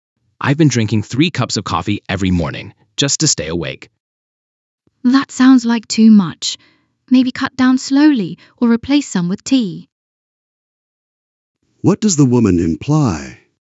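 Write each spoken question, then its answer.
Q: What does the woman imply?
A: He drinks too much coffee and should cut down slowly or replace some with tea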